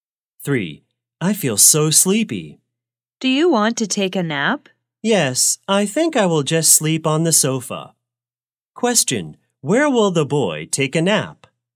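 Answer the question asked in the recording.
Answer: On the sofa.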